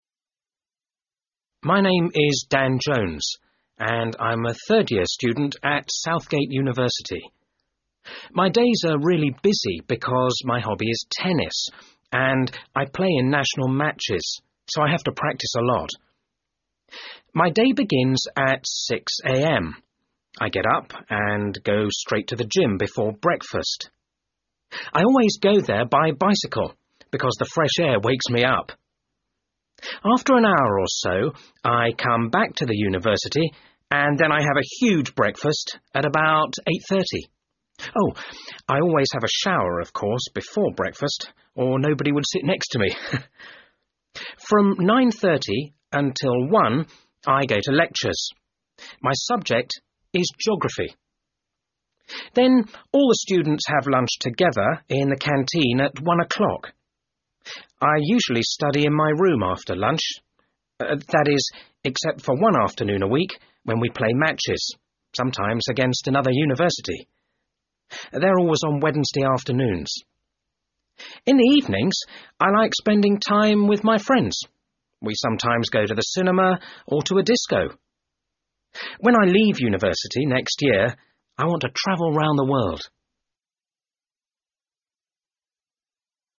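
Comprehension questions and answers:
You will listen to Dan talking about his life at University. Listen twice and try and answer these questions:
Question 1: Where does he study?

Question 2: What's his hobby?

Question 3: Describe his day?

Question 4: What time do they have lunch?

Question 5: What does he usually do in the afternoon, and where?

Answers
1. Southgate University
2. Tennis
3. Up at 6, gym, breakfast at 8:30, lectures 9:30-1, lunch, study, evenings with friends
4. At 1 o'clock
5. He studies in his room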